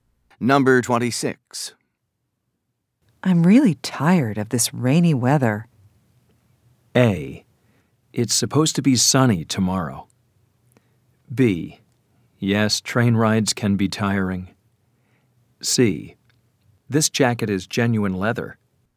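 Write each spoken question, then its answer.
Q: I'm really tired of this rainy weather.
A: A: It's supposed to be sunny tomorrow.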